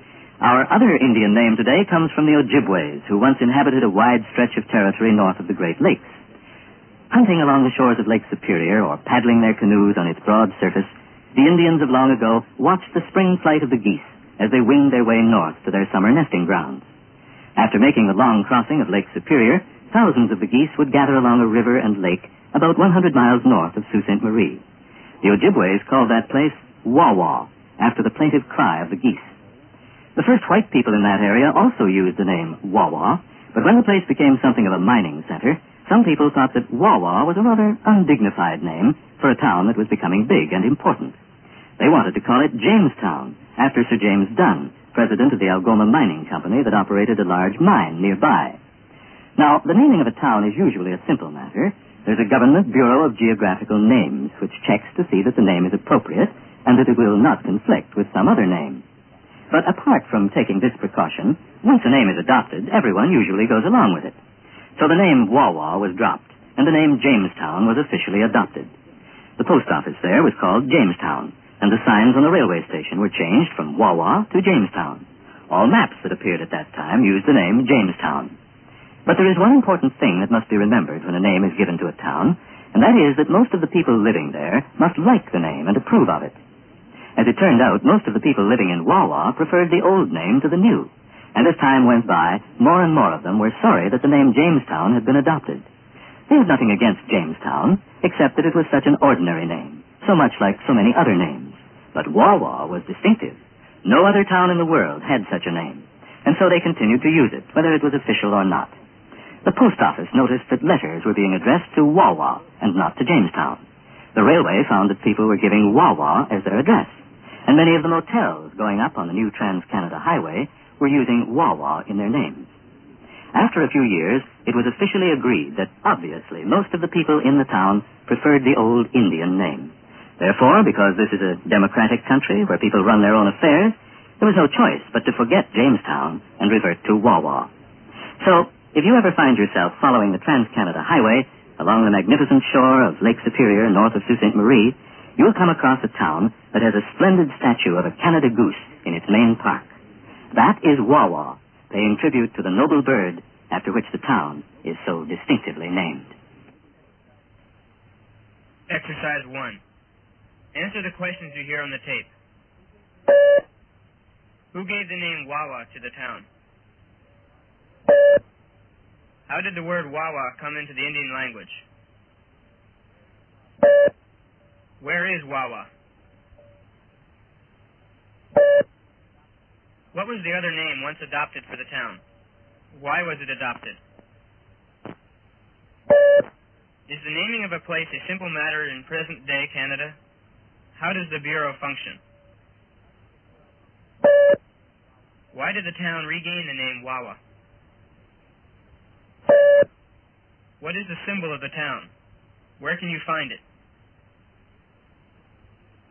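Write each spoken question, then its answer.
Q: Who gave the name Wawa to the town?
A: The Ojibway Indians

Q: How did the word Wawa come into the Indian language?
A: From the plaintive cry of the geese

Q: Where is Wawa?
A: About 100 miles north of Sault Ste. Marie, on Lake Superior

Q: What was the other name once adopted for the town?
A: Jamestown

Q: Why was it adopted?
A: It was becoming a mining center and some thought Wawa undignified; named after Sir James Dunn

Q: Is the naming of a place a simple matter in present-day Canada?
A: Yes, usually

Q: How does the Bureau function?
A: It checks that the name is appropriate and does not conflict with another name

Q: Why did the town regain the name Wawa?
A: Most people living there preferred the old distinctive name

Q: What is the symbol of the town?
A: A Canada goose

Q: Where can you find it?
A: In the town's main park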